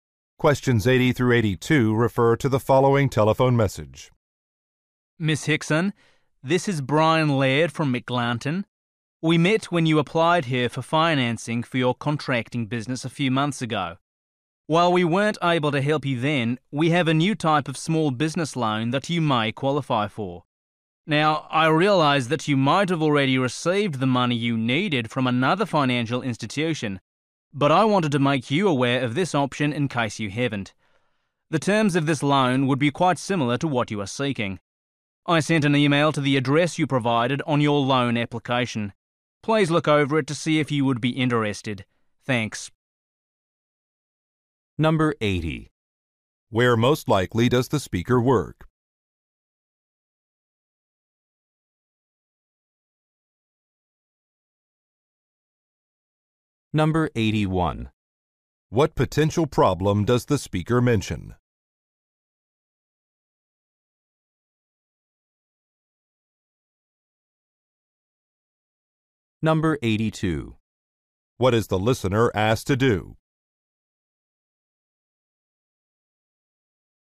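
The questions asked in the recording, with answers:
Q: Where most likely does the speaker work?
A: At a bank/financial institution

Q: What potential problem does the speaker mention?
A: The listener may already have gotten funding elsewhere

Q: What is the listener asked to do?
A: Read an email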